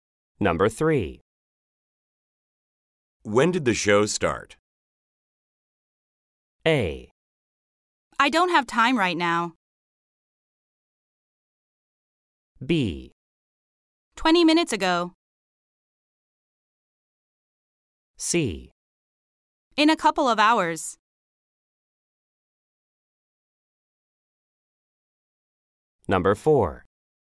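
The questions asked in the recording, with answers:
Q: When did the show start?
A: B: 20 minutes ago.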